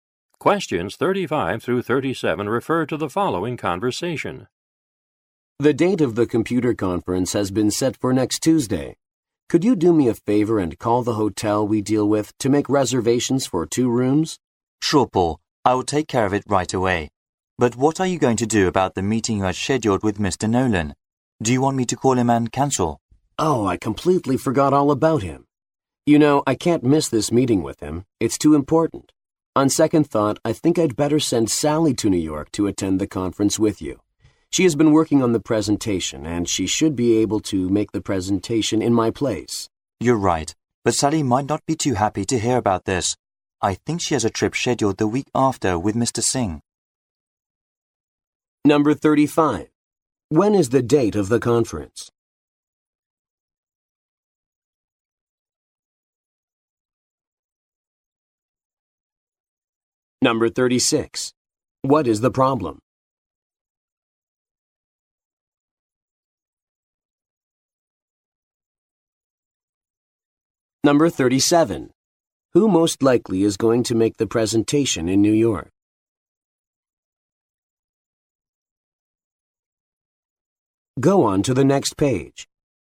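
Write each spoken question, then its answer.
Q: When is the date of the conference?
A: Next Tuesday

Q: What is the problem?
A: Paul has an important meeting with Mr. Nolan at the same time

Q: Who most likely is going to make the presentation in New York?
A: Sally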